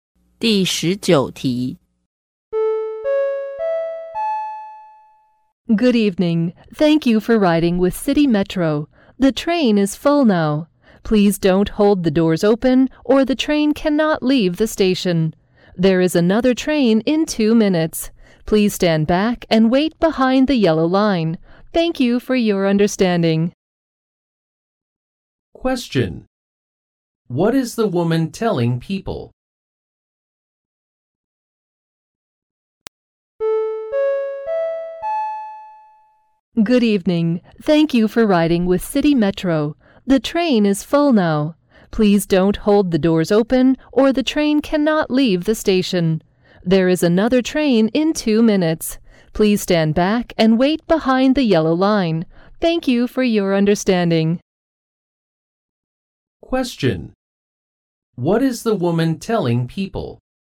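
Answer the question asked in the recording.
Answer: This train is full, so they should wait for the next one in 2 minutes.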